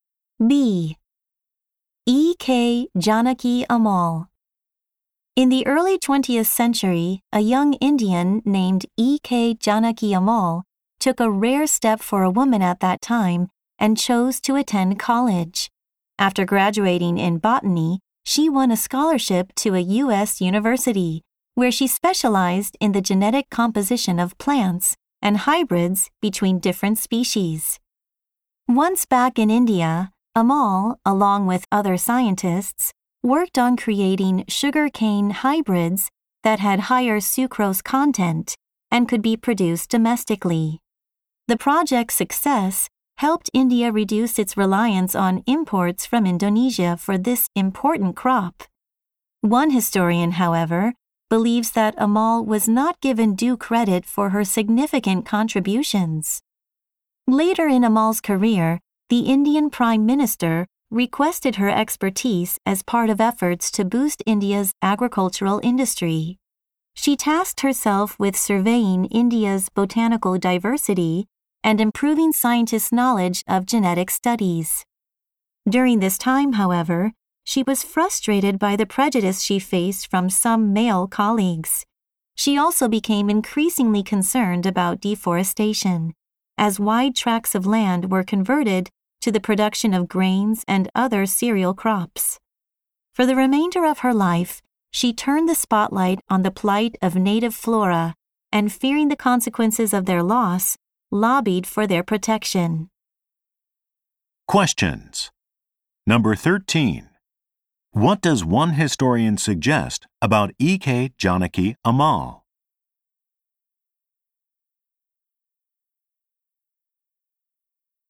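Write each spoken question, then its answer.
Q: What does one historian suggest about E.K. Janaki Amal?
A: She was not given due credit for her significant contributions.

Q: Why did Amal change the focus of her attention later in life?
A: She worried about deforestation and the loss of native plants.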